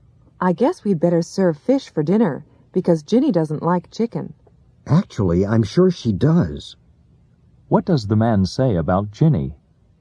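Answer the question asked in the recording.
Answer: Ginny likes chicken.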